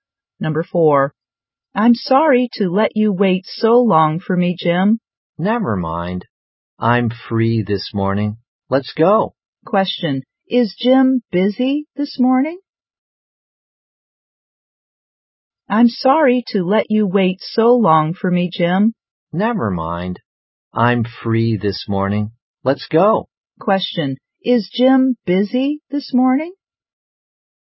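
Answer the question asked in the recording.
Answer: No, he is free this morning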